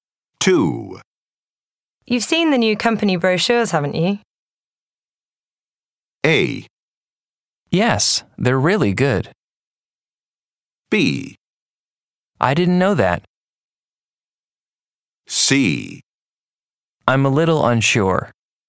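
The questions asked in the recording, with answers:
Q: You've seen the new company brochures, haven't you?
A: A: Yes, they're really good.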